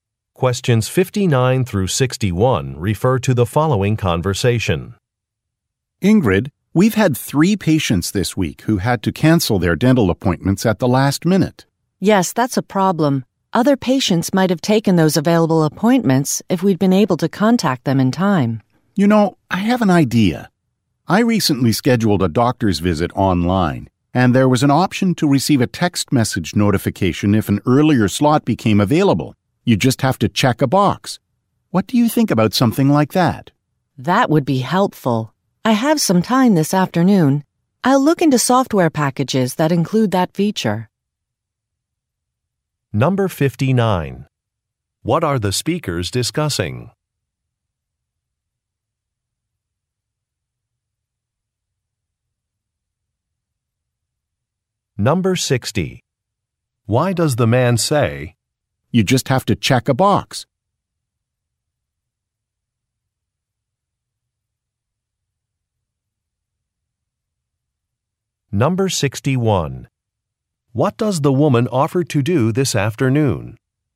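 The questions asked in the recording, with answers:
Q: What are the speakers discussing?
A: Last-minute appointment cancellations

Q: What does the woman offer to do this afternoon?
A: Look into software packages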